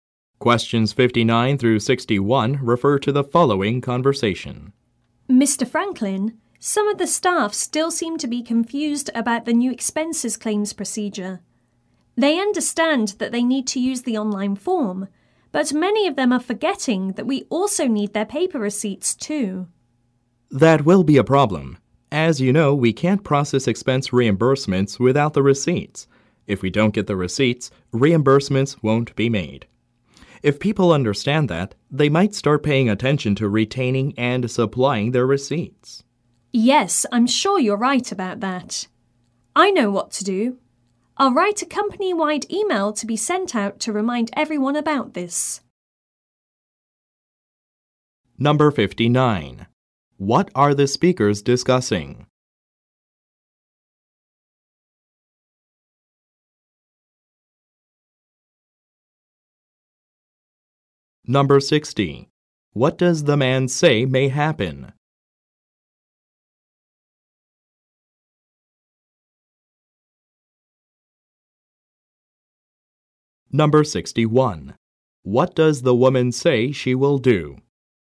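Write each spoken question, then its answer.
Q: What are the speakers discussing?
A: The new expense claims procedure (staff forgetting paper receipts)

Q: What does the man say may happen?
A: Reimbursements won't be made without receipts

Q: What does the woman say she will do?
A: Send a company-wide reminder email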